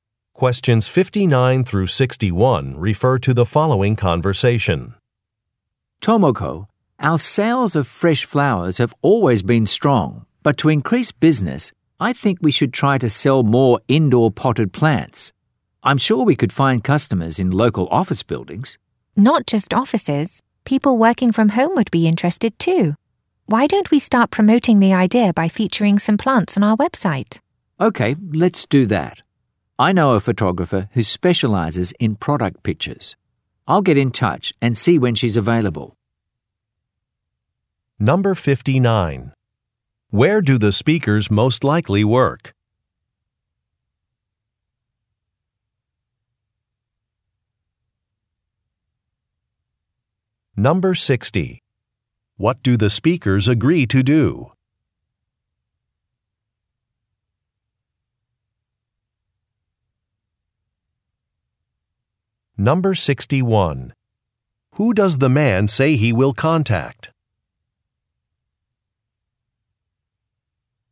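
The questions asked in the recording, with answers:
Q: Where do the speakers most likely work?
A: At a flower shop

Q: What do the speakers agree to do?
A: Feature some plants on their website

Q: Who does the man say he will contact?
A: A photographer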